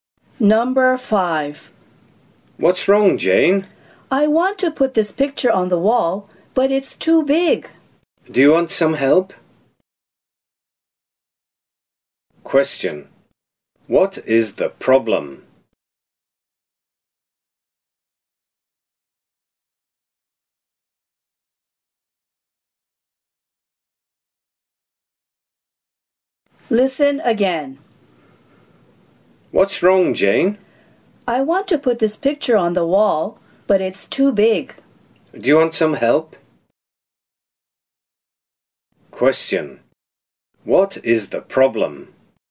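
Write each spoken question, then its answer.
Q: What is the problem?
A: The picture is too big to put on the wall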